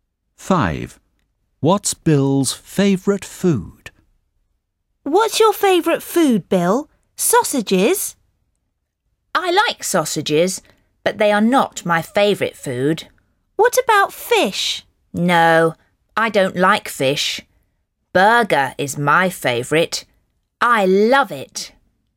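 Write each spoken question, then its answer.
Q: What's Bill's favourite food?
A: Burger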